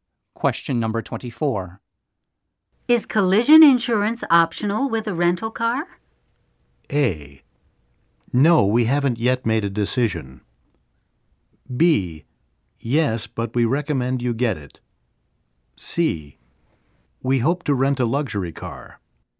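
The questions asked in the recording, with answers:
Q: Is collision insurance optional with a rental car?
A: B: Yes, but we recommend you get it.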